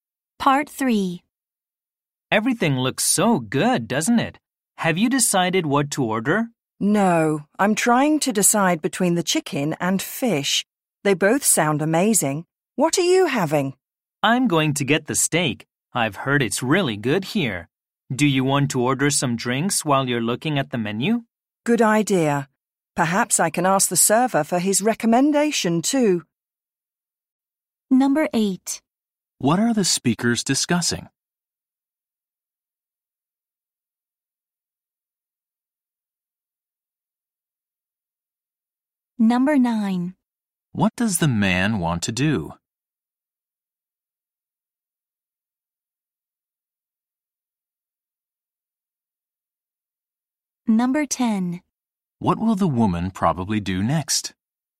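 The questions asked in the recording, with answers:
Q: What are the speakers discussing?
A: What to order at a restaurant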